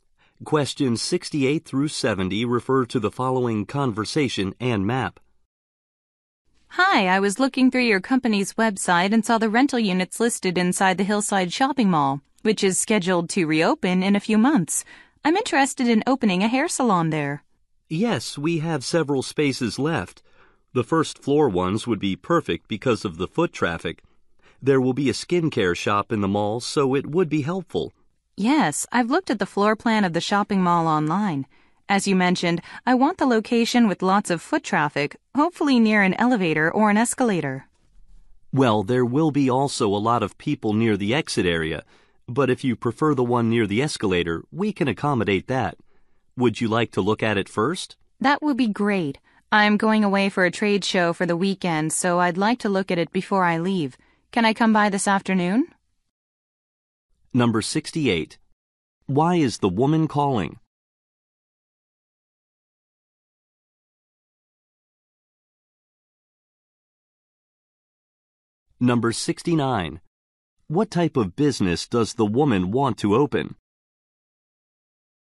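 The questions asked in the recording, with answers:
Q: Why is the woman calling?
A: To ask about renting a unit in the mall

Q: What type of business does the woman want to open?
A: A hair salon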